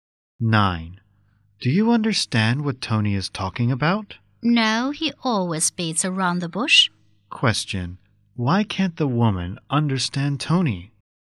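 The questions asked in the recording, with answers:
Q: Why can't the woman understand Tony?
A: He never comes to the point.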